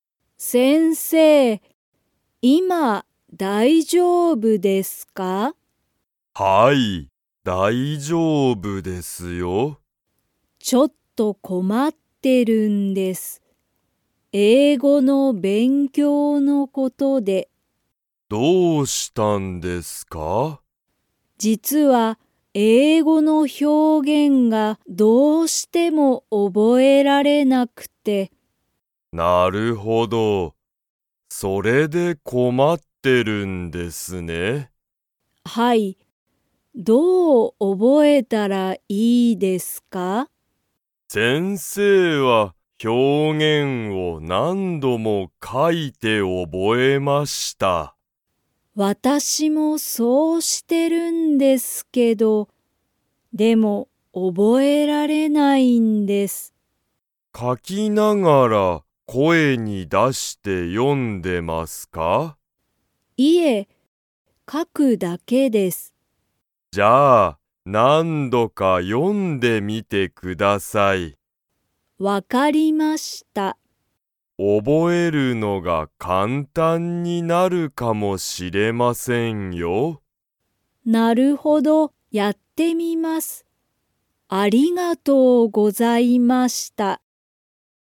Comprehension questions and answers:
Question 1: カナは英語えいごの が覚おぼえられない。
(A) 表現ひょうげん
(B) 料理りょうり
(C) 旅行りょこう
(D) 声こえ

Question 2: カナは、表現ひょうげんを声こえに出だして読よんでますか?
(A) はい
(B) いいえ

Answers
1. A
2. B

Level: Level 3

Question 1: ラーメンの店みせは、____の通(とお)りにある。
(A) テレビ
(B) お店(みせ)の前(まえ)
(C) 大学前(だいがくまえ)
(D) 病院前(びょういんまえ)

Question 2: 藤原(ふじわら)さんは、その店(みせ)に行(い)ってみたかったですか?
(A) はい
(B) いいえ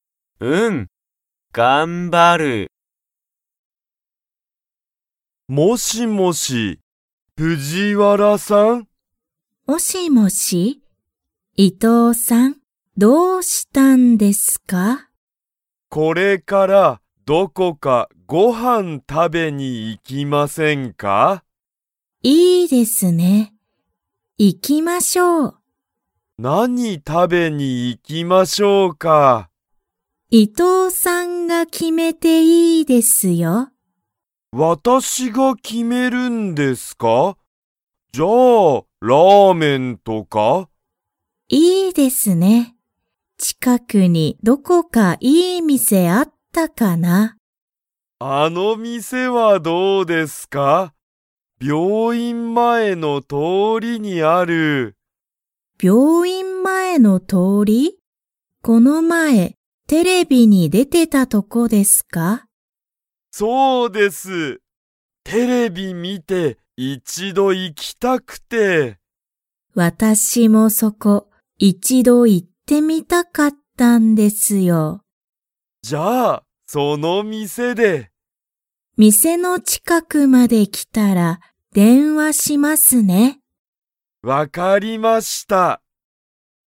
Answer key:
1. D
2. A

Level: Level 2

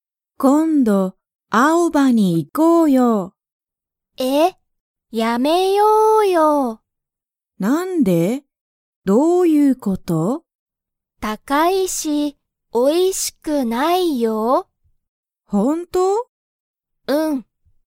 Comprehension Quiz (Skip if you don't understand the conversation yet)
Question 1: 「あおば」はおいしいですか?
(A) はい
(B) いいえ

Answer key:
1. B

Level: Level 1

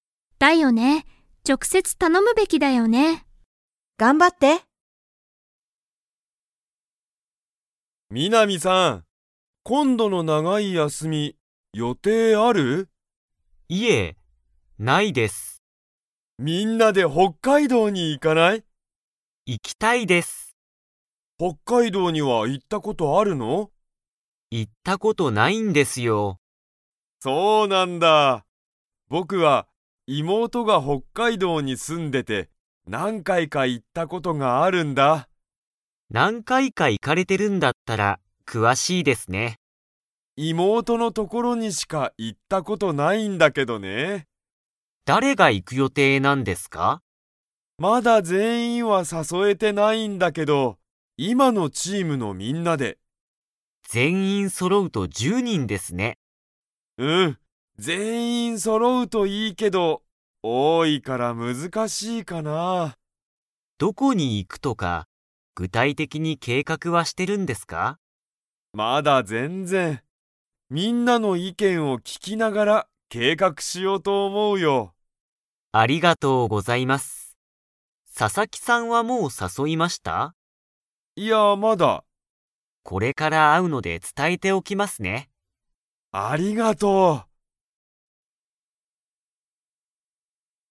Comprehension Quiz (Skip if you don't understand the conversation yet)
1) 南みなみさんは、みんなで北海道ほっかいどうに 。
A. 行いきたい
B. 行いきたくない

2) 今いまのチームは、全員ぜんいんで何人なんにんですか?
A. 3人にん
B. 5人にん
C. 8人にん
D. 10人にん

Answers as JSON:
{"1": "A", "2": "D"}

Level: Level 4

